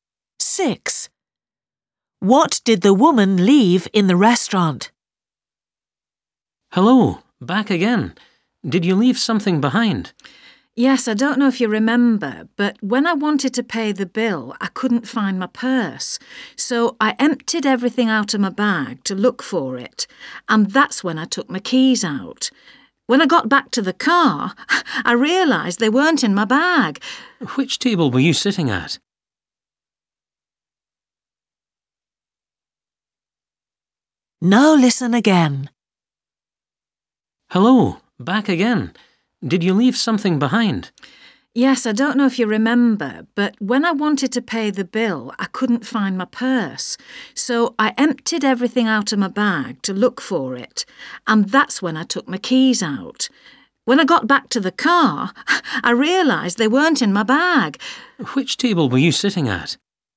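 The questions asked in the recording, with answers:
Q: What did the woman leave in the restaurant?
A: Her keys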